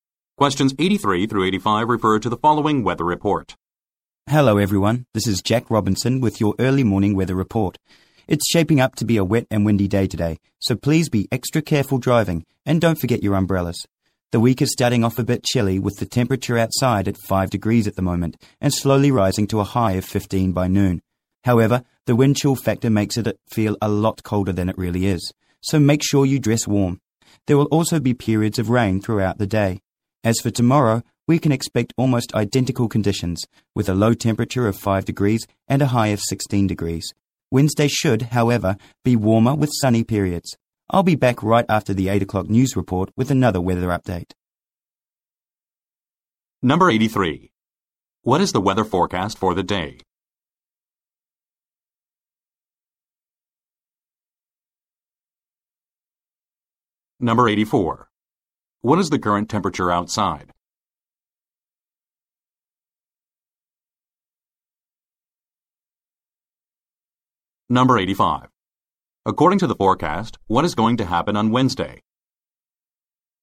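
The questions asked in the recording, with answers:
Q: What is the weather forecast for the day?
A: Wet and windy

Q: What is the current temperature outside?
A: 5 degrees

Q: According to the forecast, what is going to happen on Wednesday?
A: It will be warmer with sunny periods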